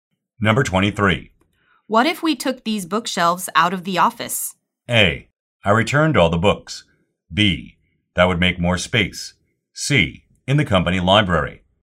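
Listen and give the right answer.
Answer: B: That would make more space.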